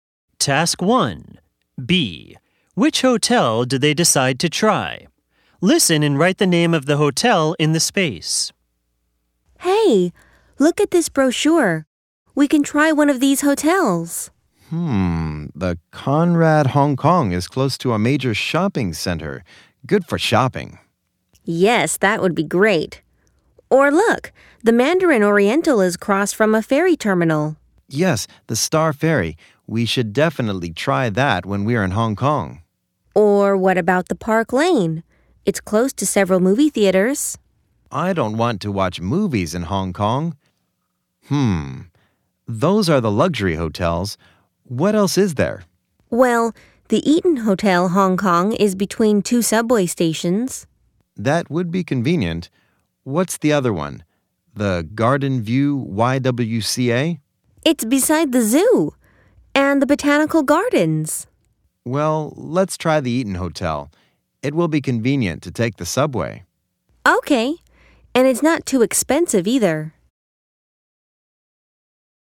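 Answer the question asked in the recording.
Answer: The Eaton Hotel Hong Kong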